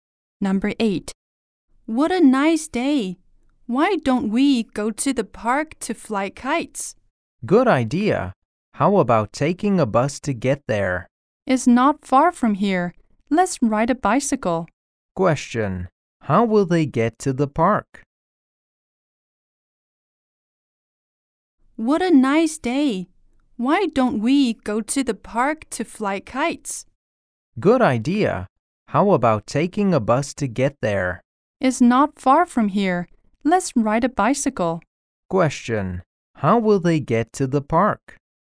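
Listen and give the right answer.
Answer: By bicycle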